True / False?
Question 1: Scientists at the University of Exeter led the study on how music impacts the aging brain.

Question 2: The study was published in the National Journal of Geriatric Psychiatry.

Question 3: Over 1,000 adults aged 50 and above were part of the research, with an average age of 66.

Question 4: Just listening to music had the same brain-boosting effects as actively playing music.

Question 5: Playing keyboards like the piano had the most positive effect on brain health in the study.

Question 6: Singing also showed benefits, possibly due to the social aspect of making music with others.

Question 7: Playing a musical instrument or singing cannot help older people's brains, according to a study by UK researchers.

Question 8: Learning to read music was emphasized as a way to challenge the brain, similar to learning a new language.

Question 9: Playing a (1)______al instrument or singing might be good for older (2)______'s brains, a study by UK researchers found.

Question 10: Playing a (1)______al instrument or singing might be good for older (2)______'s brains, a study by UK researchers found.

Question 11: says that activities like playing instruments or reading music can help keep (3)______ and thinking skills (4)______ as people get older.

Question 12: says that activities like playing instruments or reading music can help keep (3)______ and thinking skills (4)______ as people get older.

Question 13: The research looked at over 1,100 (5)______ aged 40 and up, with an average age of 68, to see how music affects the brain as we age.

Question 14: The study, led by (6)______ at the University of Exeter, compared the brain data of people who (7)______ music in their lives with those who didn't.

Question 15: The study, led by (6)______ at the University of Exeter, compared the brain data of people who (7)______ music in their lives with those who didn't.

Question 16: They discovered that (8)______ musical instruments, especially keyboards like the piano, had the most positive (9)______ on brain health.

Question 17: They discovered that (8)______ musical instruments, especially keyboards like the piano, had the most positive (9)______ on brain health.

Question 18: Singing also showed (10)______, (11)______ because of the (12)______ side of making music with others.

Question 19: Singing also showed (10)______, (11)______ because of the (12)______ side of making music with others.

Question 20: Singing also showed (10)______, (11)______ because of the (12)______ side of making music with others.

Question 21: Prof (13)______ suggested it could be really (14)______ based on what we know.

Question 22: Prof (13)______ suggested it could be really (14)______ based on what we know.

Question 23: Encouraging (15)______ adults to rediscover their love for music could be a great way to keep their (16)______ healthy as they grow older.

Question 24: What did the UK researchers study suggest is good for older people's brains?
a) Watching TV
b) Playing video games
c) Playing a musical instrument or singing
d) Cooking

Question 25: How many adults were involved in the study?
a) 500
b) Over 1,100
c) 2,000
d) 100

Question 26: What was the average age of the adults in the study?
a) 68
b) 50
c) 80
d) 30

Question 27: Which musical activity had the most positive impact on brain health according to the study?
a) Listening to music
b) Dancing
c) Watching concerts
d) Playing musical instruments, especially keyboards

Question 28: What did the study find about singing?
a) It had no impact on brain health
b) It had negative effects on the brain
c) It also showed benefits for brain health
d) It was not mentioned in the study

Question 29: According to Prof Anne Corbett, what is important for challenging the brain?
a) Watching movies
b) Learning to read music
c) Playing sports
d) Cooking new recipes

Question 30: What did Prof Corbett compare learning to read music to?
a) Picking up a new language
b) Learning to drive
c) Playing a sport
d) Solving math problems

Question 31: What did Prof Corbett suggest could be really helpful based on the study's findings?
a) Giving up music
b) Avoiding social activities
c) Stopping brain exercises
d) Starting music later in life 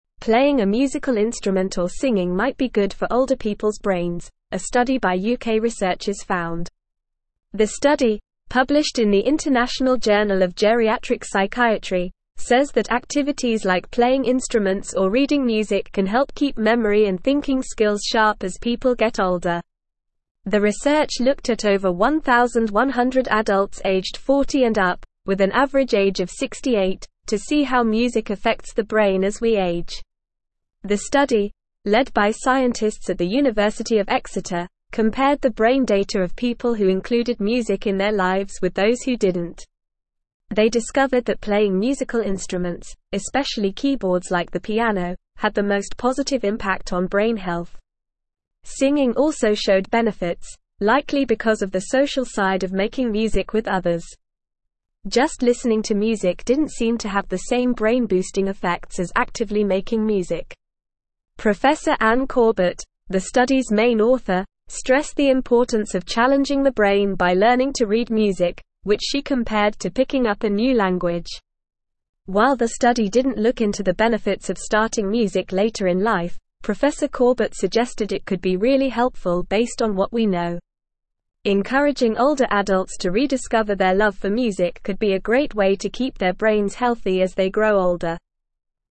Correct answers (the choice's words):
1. True
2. False
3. False
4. False
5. True
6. True
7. False
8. True
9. music
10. people
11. memory
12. sharp
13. adults
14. scientists
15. included
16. playing
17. impact
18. benefits
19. likely
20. social
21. Corbett
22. helpful
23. brains
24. Playing a musical instrument or singing
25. Over 1,100
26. 68
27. Playing musical instruments, especially keyboards
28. It also showed benefits for brain health
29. Learning to read music
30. Picking up a new language
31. Starting music later in life

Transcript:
Playing a musical instrument or singing might be good for older people's brains, a study by UK researchers found. The study, published in the International Journal of Geriatric Psychiatry, says that activities like playing instruments or reading music can help keep memory and thinking skills sharp as people get older. The research looked at over 1,100 adults aged 40 and up, with an average age of 68, to see how music affects the brain as we age.
The study, led by scientists at the University of Exeter, compared the brain data of people who included music in their lives with those who didn't. They discovered that playing musical instruments, especially keyboards like the piano, had the most positive impact on brain health. Singing also showed benefits, likely because of the social side of making music with others. Just listening to music didn't seem to have the same brain-boosting effects as actively making music.
Prof Anne Corbett, the study's main author, stressed the importance of challenging the brain by learning to read music, which she compared to picking up a new language. While the study didn't look into the benefits of starting music later in life, Prof Corbett suggested it could be really helpful based on what we know. Encouraging older adults to rediscover their love for music could be a great way to keep their brains healthy as they grow older.

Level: Level 3